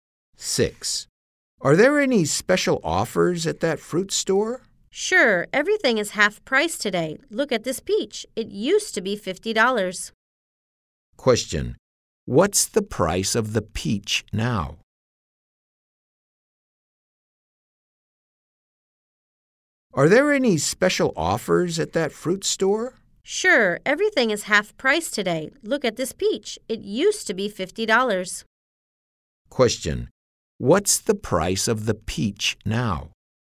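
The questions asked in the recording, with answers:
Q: What's the price of the peach now?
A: $25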